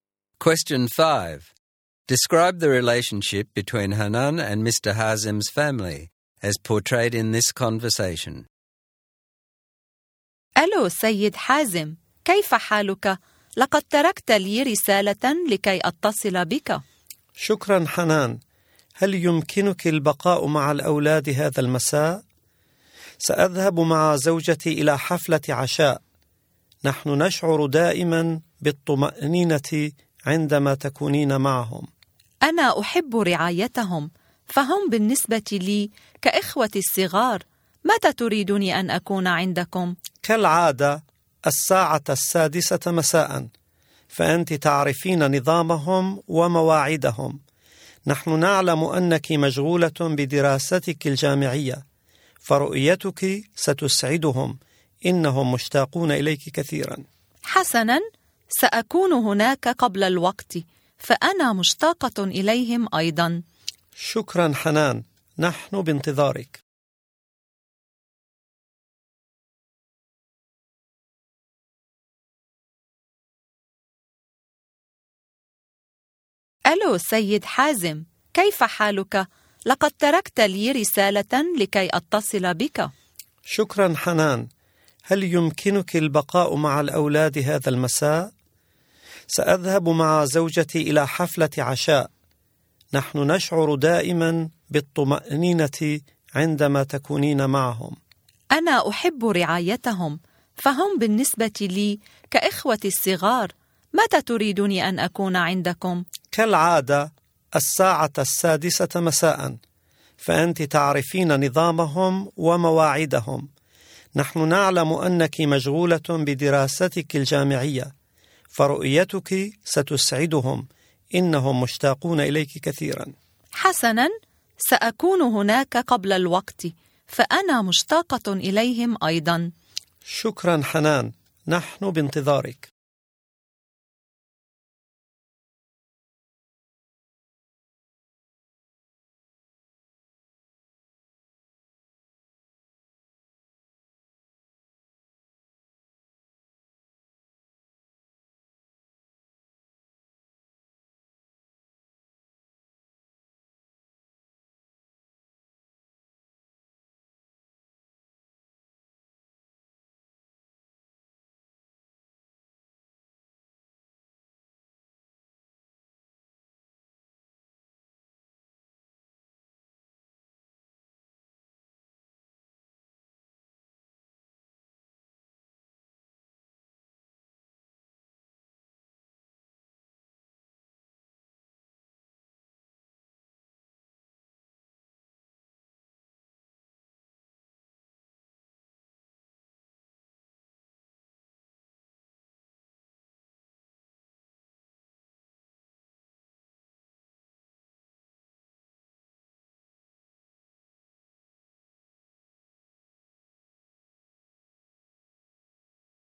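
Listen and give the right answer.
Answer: It is close and trusting. Hanan is their regular babysitter, the family trusts her, she sees the children as her little siblings, and they miss one another.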